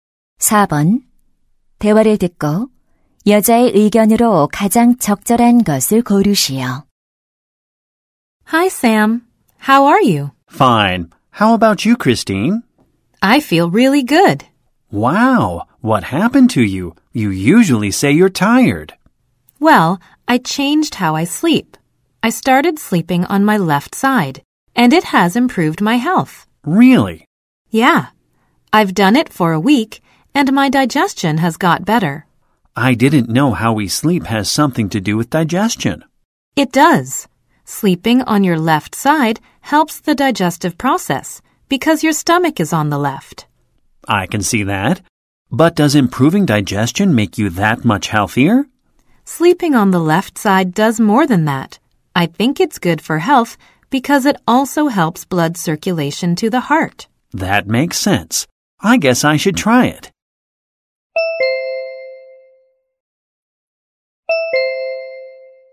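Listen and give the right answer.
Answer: 왼쪽으로 누워 자는 것이 건강에 좋다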